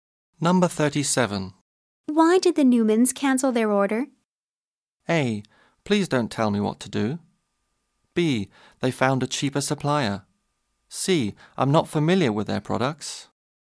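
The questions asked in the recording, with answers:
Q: Why did the Newmans cancel their order?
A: B: They found a cheaper supplier.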